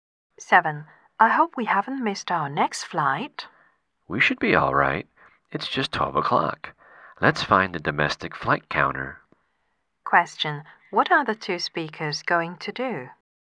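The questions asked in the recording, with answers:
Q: What are the two speakers going to do?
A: Find the domestic flight counter to catch their next flight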